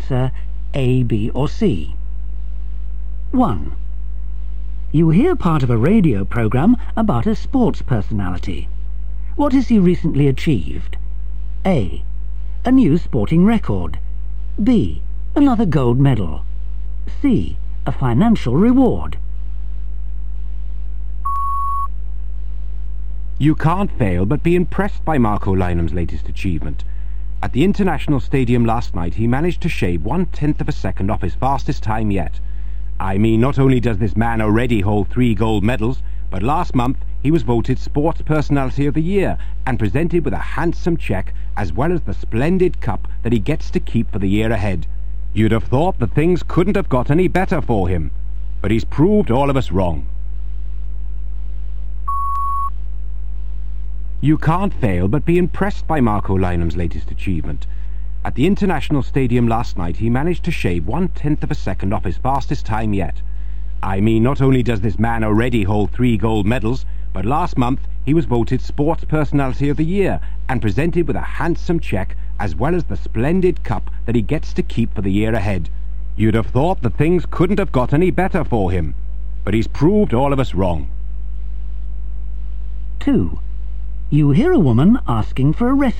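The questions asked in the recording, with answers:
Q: What has he recently achieved?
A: A: A new sporting record.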